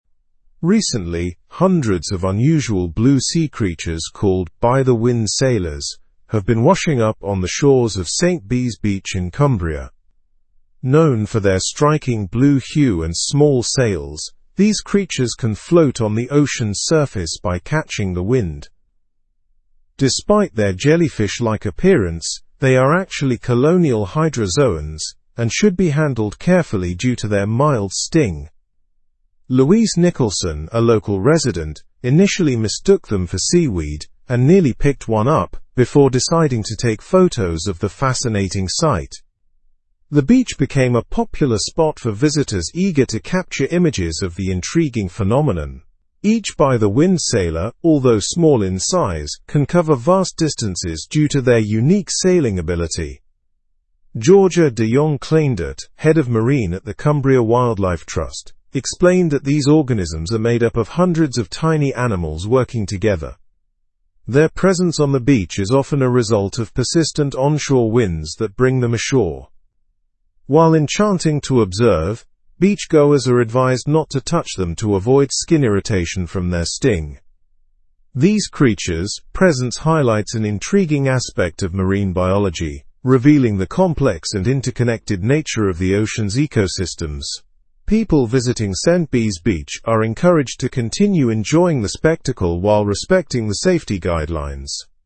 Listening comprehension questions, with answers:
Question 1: What creatures have been washing up on the shores of St Bees beach?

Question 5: What causes the by-the-wind sailors to be brought ashore?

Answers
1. By-the-wind sailors have been washing up on the shores.
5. Persistent onshore winds cause them to be brought ashore.

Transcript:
Recently, hundreds of unusual blue sea creatures called by-the-wind sailors have been washing up on the shores of St Bees beach in Cumbria. Known for their striking blue hue and small sails, these creatures can float on the ocean's surface by catching the wind. Despite their jellyfish-like appearance, they are actually colonial hydrozoans and should be handled carefully due to their mild sting.
Louise Nicholson, a local resident, initially mistook them for seaweed and nearly picked one up before deciding to take photos of the fascinating sight. The beach became a popular spot for visitors eager to capture images of the intriguing phenomenon. Each by-the-wind sailor, although small in size, can cover vast distances due to their unique sailing ability.
Georgia de Jong Cleyndert, Head of Marine at the Cumbria Wildlife Trust, explained that these organisms are made up of hundreds of tiny animals working together. Their presence on the beach is often a result of persistent onshore winds that bring them ashore. While enchanting to observe, beachgoers are advised not to touch them to avoid skin irritation from their sting.
These creatures' presence highlights an intriguing aspect of marine biology, revealing the complex and interconnected nature of the ocean's ecosystems. People visiting St Bees beach are encouraged to continue enjoying the spectacle while respecting the safety guidelines.

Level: Level 3